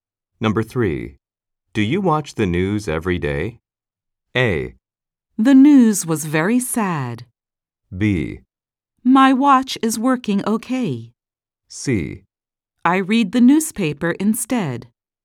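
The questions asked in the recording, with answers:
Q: Do you watch the news every day?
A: C: I read the newspaper instead.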